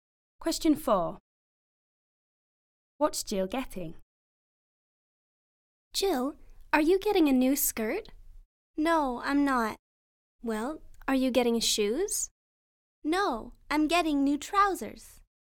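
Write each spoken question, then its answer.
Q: What's Jill getting?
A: New trousers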